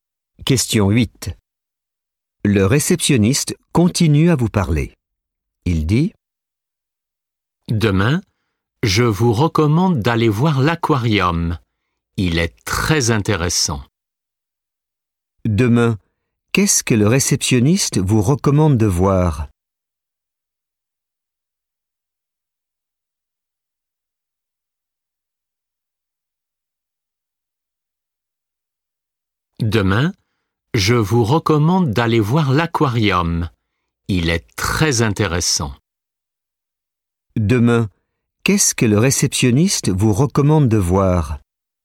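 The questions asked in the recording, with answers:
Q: Demain, qu'est-ce que le réceptionniste vous recommande de voir?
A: L'aquarium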